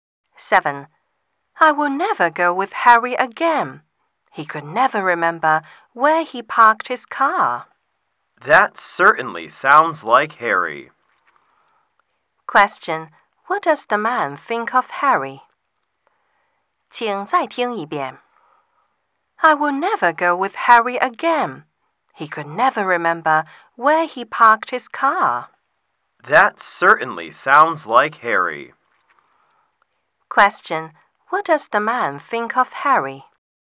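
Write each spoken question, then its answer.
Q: What does the man think of Harry?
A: He is forgetful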